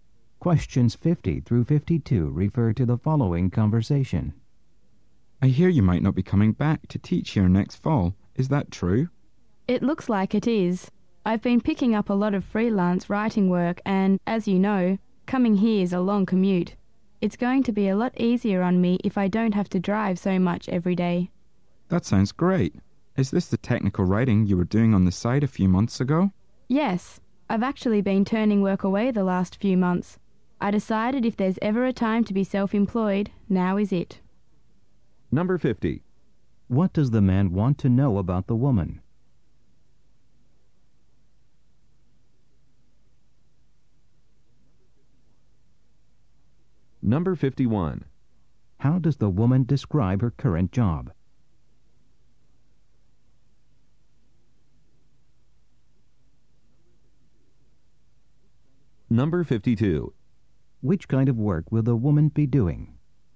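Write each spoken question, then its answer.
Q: What does the man want to know about the woman?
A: Whether she is leaving her teaching job

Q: How does the woman describe her current job?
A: It's a long commute

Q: Which kind of work will the woman be doing?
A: Freelance technical writing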